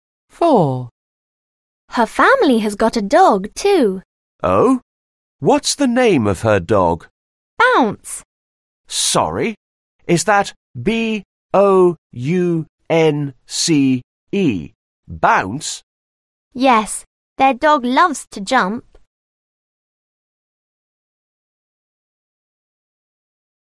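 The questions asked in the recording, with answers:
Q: What's the name of her dog?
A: Bounce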